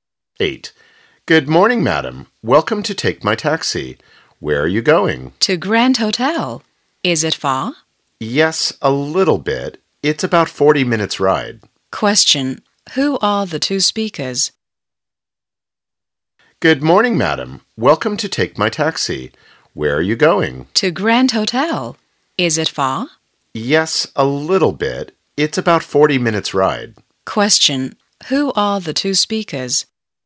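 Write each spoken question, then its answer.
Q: Who are the two speakers?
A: A taxi driver and a passenger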